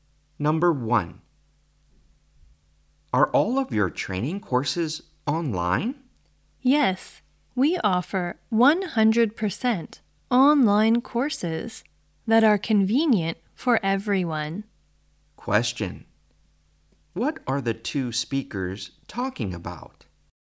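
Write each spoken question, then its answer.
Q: What are the 2 speakers talking about?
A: Online training courses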